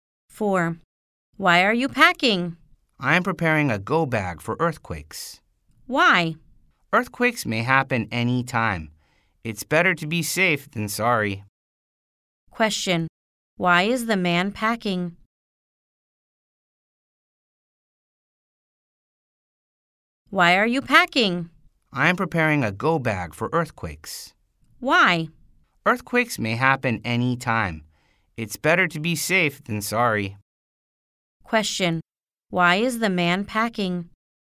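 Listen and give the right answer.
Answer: He is preparing a go bag for earthquakes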